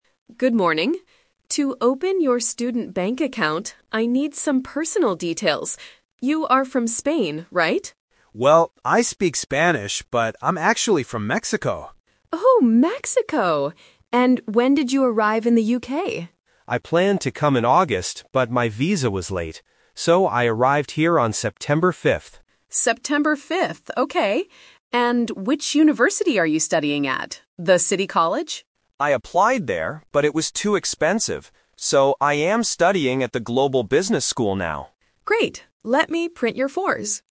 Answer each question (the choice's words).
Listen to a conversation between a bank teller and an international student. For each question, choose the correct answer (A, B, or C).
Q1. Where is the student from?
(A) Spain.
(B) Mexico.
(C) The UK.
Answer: Mexico.

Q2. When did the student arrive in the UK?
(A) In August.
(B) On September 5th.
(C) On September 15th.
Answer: On September 5th.

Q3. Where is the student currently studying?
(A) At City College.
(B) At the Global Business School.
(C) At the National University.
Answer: At the Global Business School.

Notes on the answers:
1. The student corrects the teller by saying, "...but I'm actually from Mexico." Why the traps are wrong: Option A is a "Twist Trap". The teller guesses Spain, and the student says he speaks Spanish, but he is not from there. Option C is the country he just arrived in, not his home country.
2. The student explains the delay: "So, I arrived here on September 5th." Why the traps are wrong: Option A is a trap. He planned to arrive in August, but his visa was late. Option C is a phonetic distractor (5th vs 15th).
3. The student states his current school clearly: "So, I am studying at the Global Business School now." Why the traps are wrong: Option A is the trap. The teller asks if he studies at City College, and the student says he applied there, but didn't go because it was too expensive. Option C is not mentioned in the audio.

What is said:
Teller: Good morning. To open your student bank account, I need some personal details. You are from Spain, right?
Student: Well, I speak Spanish, but I'm actually from Mexico.
Teller: Oh, Mexico! And when did you arrive in the UK?
Student: I planned to come in August, but my visa was late. So, I arrived here on September 5th.
Teller: September 5th, okay. And which university are you studying at? The City College?
Student: I applied there, but it was too expensive. So, I am studying at the Global Business School now.